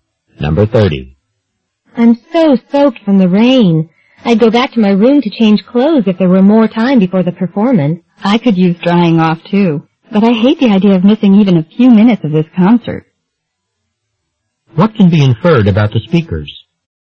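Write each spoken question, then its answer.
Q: What can be inferred about the speakers?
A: They will stay at the concert in their wet clothes.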